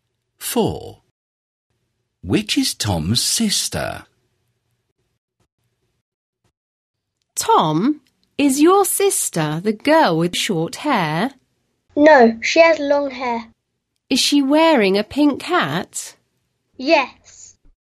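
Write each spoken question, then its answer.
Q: Which is Tom's sister?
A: The girl with long hair and a pink hat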